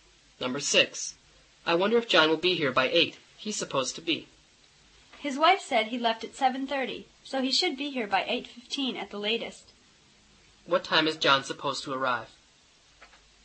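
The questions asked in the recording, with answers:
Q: What time is John supposed to arrive?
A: By 8 o'clock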